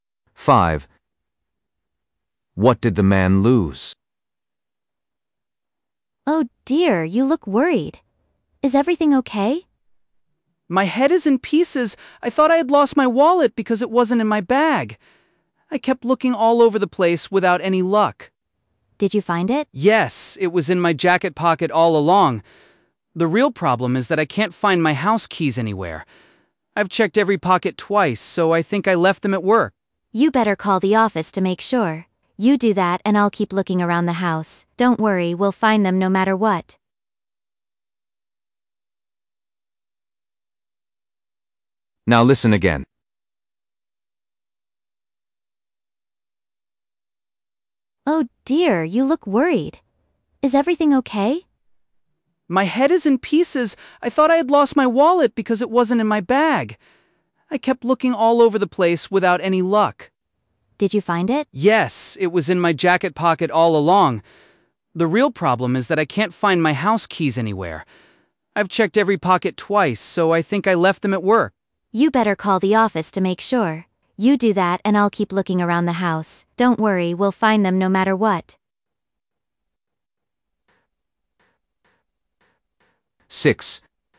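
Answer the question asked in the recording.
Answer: his house keys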